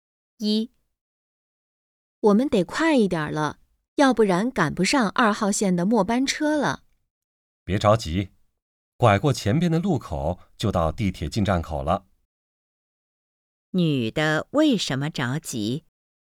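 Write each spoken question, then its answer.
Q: 女的为什么着急?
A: 怕赶不上2号线的末班车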